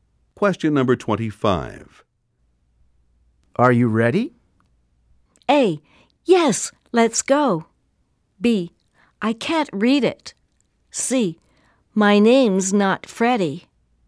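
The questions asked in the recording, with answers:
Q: Are you ready?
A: A: Yes, let's go.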